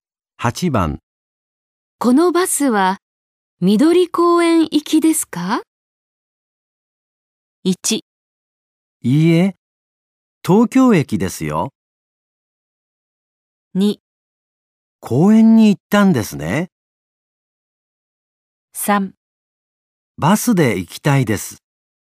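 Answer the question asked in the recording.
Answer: 1: いいえ、東京駅ですよ。

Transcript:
1
いいえ、東京駅ですよ。
2
公園に行ったんですね。
3
バスで行きたいです。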